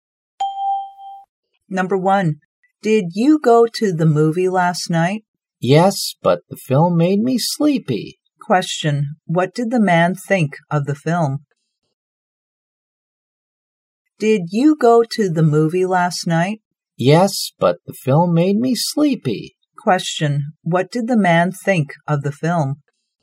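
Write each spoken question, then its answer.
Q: what did the man think of the film?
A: Boring; it made him sleepy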